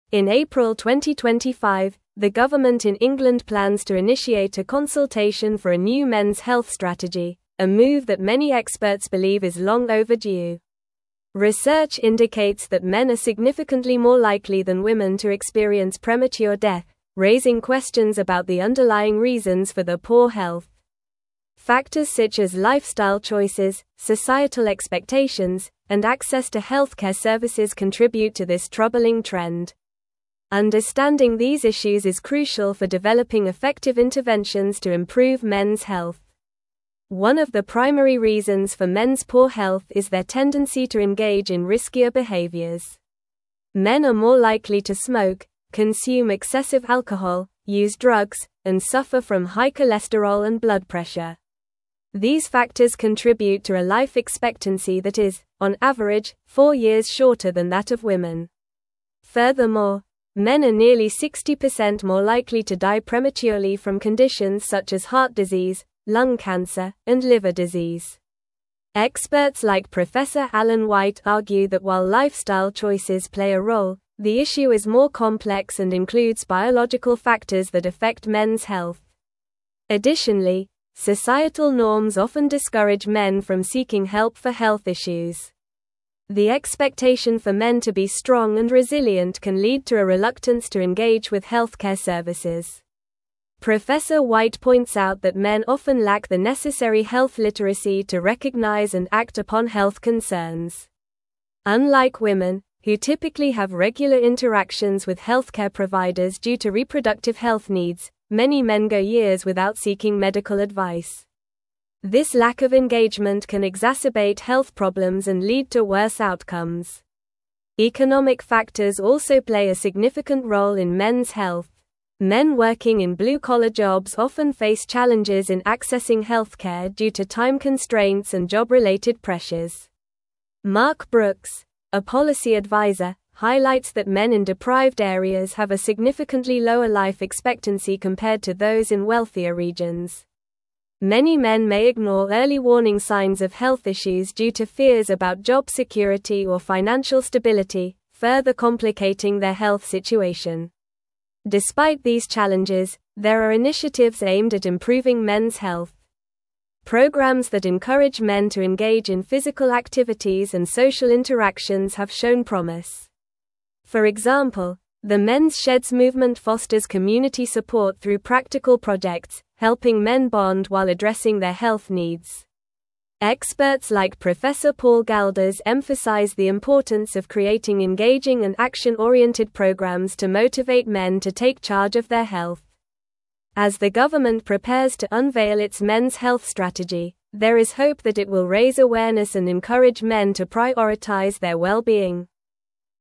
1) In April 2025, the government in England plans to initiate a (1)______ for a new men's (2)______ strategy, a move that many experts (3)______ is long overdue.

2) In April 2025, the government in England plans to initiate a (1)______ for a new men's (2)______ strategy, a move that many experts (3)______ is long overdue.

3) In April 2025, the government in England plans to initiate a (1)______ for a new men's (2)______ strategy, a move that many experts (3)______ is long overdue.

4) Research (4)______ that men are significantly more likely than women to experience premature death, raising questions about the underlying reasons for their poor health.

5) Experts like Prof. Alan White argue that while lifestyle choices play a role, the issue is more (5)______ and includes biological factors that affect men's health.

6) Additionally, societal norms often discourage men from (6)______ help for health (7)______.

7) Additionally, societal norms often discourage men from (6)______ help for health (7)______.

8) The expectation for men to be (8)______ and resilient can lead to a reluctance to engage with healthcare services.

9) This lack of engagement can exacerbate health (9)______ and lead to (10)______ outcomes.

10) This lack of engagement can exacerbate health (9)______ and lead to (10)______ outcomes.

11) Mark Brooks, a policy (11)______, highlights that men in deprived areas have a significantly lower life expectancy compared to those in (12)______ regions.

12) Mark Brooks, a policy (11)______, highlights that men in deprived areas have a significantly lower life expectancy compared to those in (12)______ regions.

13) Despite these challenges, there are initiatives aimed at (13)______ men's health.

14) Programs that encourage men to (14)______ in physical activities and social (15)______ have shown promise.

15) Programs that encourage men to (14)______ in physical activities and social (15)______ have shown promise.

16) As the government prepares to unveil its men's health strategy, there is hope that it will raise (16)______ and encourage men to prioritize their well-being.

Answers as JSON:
{"1": "consultation", "2": "health", "3": "believe", "4": "indicates", "5": "complex", "6": "seeking", "7": "issues", "8": "strong", "9": "problems", "10": "worse", "11": "adviser", "12": "wealthier", "13": "improving", "14": "engage", "15": "interactions", "16": "awareness"}

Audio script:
In April 2025, the government in England plans to initiate a consultation for a new men's health strategy, a move that many experts believe is long overdue. Research indicates that men are significantly more likely than women to experience premature death, raising questions about the underlying reasons for their poor health. Factors such as lifestyle choices, societal expectations, and access to healthcare services contribute to this troubling trend. Understanding these issues is crucial for developing effective interventions to improve men's health.
One of the primary reasons for men's poor health is their tendency to engage in riskier behaviors. Men are more likely to smoke, consume excessive alcohol, use drugs, and suffer from high cholesterol and blood pressure. These factors contribute to a life expectancy that is, on average, four years shorter than that of women. Furthermore, men are nearly 60% more likely to die prematurely from conditions such as heart disease, lung cancer, and liver disease. Experts like Prof. Alan White argue that while lifestyle choices play a role, the issue is more complex and includes biological factors that affect men's health.
Additionally, societal norms often discourage men from seeking help for health issues. The expectation for men to be strong and resilient can lead to a reluctance to engage with healthcare services. White points out that men often lack the necessary health literacy to recognize and act upon health concerns. Unlike women, who typically have regular interactions with healthcare providers due to reproductive health needs, many men go years without seeking medical advice. This lack of engagement can exacerbate health problems and lead to worse outcomes.
Economic factors also play a significant role in men's health. Men working in blue-collar jobs often face challenges in accessing healthcare due to time constraints and job-related pressures. Mark Brooks, a policy adviser, highlights that men in deprived areas have a significantly lower life expectancy compared to those in wealthier regions. Many men may ignore early warning signs of health issues due to fears about job security or financial stability, further complicating their health situation.
Despite these challenges, there are initiatives aimed at improving men's health. Programs that encourage men to engage in physical activities and social interactions have shown promise. For example, the Men's Sheds movement fosters community support through practical projects, helping men bond while addressing their health needs. Experts like Prof. Paul Galdas emphasize the importance of creating engaging and action-oriented programs to motivate men to take charge of their health. As the government prepares to unveil its men's health strategy, there is hope that it will raise awareness and encourage men to prioritize their well-being.

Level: Level 4